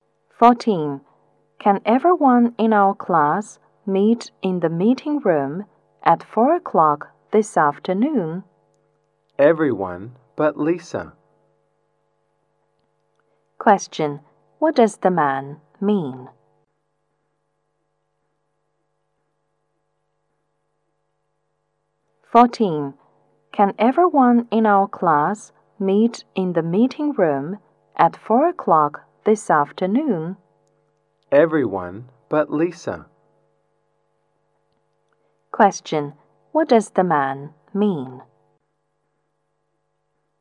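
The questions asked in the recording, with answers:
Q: What does the man mean?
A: Everyone except Lisa can come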